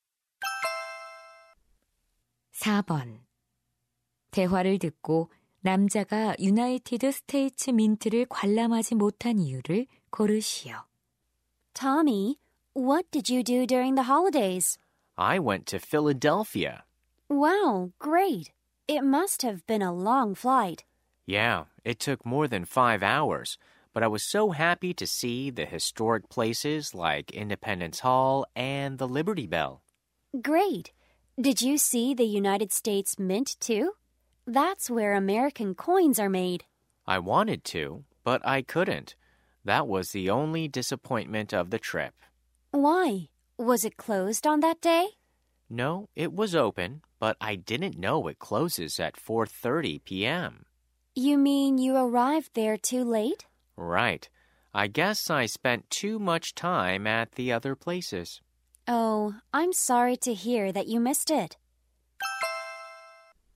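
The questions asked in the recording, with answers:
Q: 대화를 듣고 남자가 유나이티드 스테이츠 민트를 관람하지 못한 이유를 고르시오.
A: 폐관 시간(오후 4시 30분) 이후에 너무 늦게 도착해서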